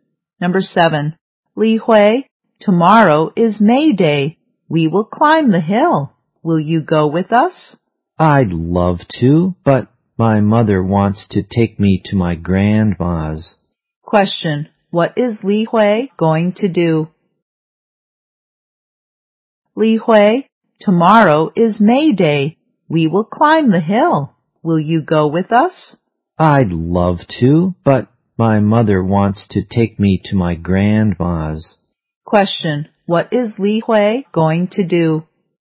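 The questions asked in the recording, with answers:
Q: What is Li Hui going to do?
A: Go to her grandma's with her mother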